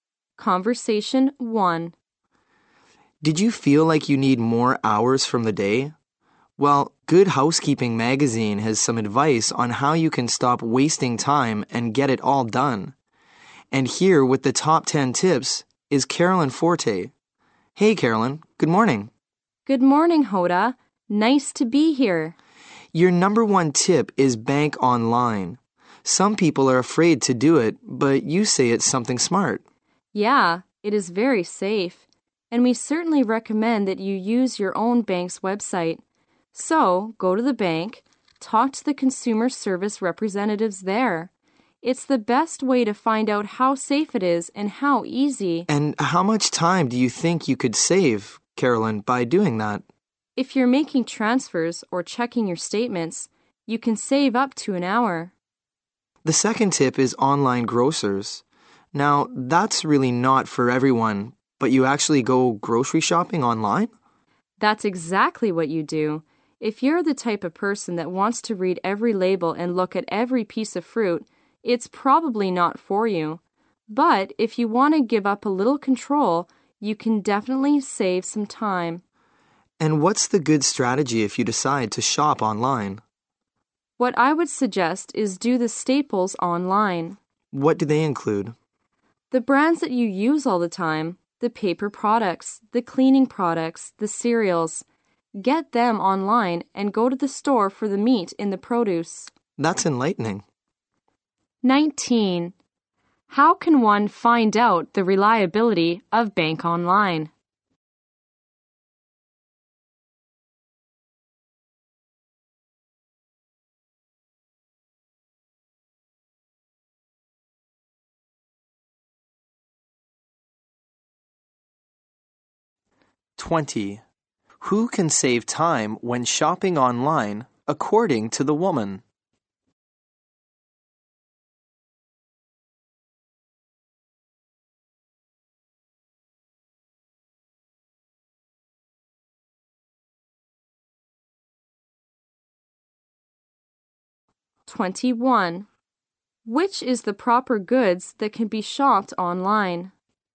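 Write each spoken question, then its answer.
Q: How can one find out the reliability of bank online?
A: Talk to the consumer service representatives at the bank.

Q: Who can save time when shopping online, according to the woman?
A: People willing to give up a little control.

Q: Which is the proper goods that can be shopped online?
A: Staples such as paper products, cleaning products and cereals.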